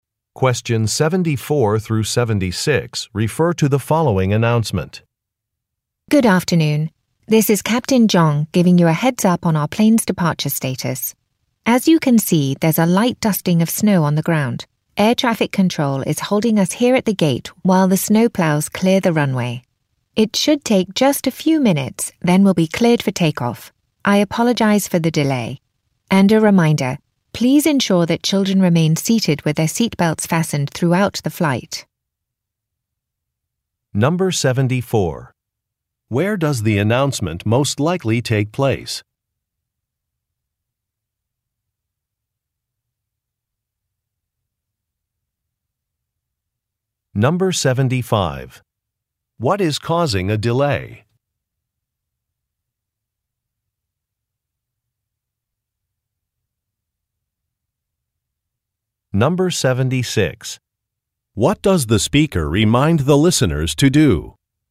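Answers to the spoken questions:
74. On an airplane
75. Snow being cleared from the runway
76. Make sure children stay seated with seatbelts fastened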